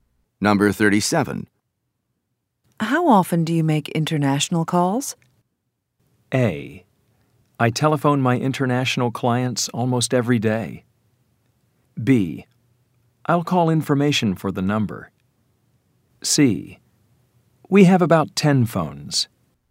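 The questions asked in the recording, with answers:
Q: How often do you make international calls?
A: A: I telephone my international clients almost every day.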